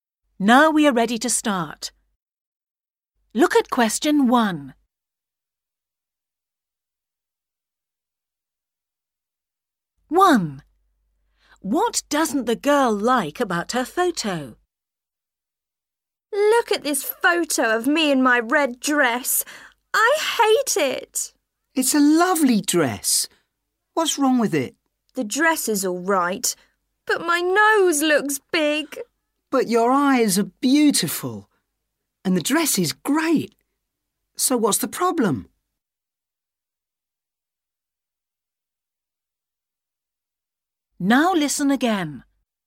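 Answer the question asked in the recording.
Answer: her nose (it looks big)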